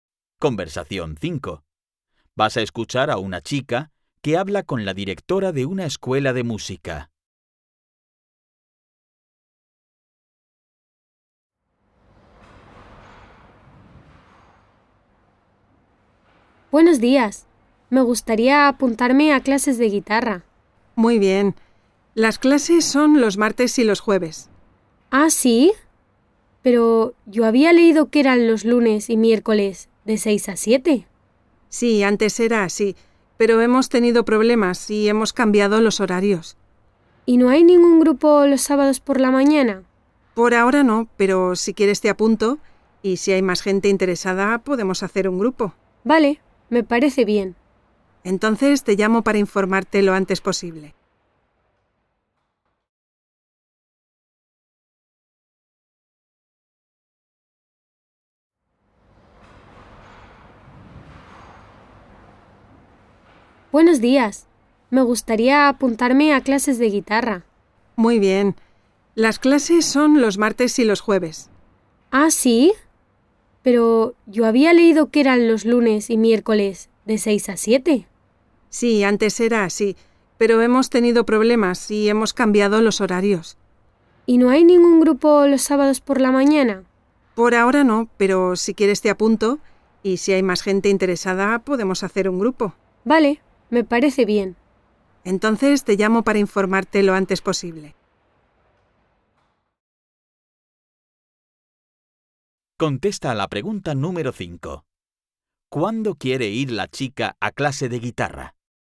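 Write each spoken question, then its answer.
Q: ¿Cuándo quiere ir la chica a clase de guitarra?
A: Los sábados por la mañana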